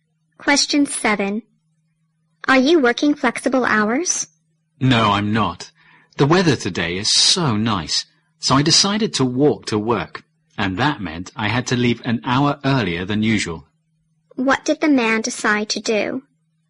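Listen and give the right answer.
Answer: Walk to work.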